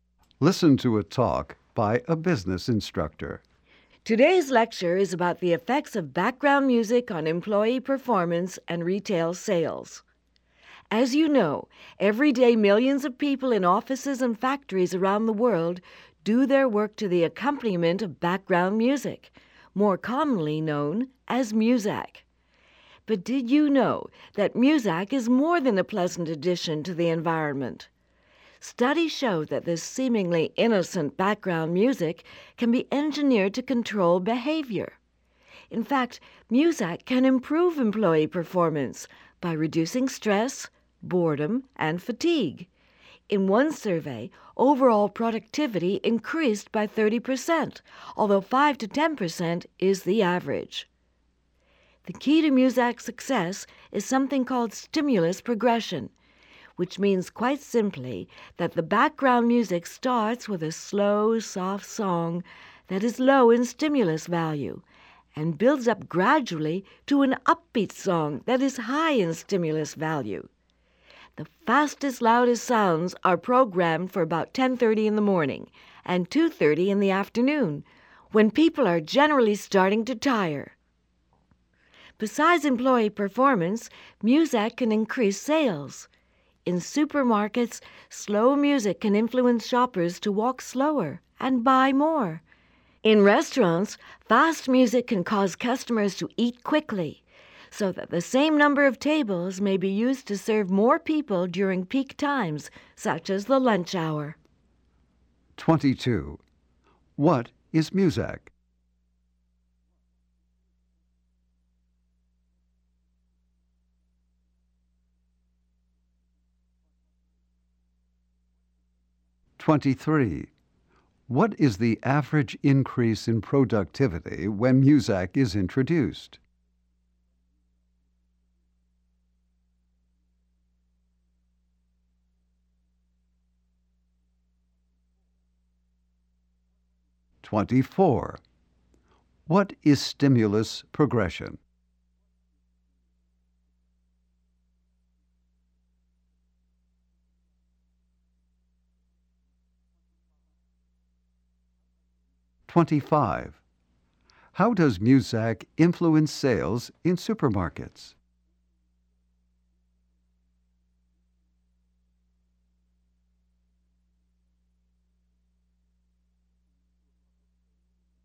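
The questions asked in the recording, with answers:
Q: What is Muzak?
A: Background music played in workplaces and stores.

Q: What is the average increase in productivity when Muzak is introduced?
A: 5 to 10 percent.

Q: What is stimulus progression?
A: Music that builds gradually from slow, soft songs to upbeat ones.

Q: How does Muzak influence sales in supermarkets?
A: Slow music makes shoppers walk slower and buy more.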